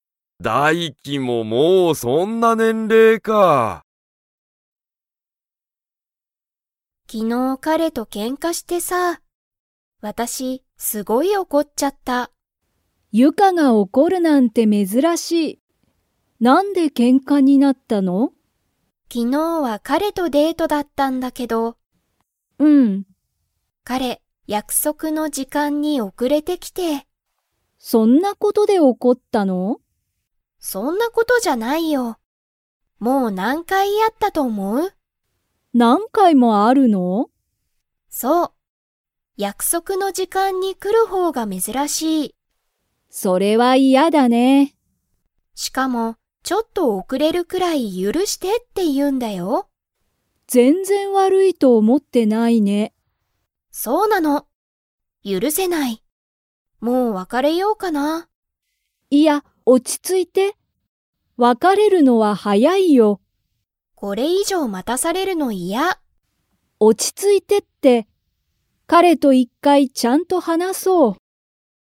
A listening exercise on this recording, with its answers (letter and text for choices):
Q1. ゆかは、彼かれが約束やくそくの時間じかんに から怒おこった。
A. 別わかれた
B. 来きた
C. 遅おくれた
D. 許ゆるした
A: C. 遅おくれた

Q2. みきは、二人ふたりが別わかれるのは早はやいと思おもっていますか?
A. はい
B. いいえ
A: A. はい

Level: Level 4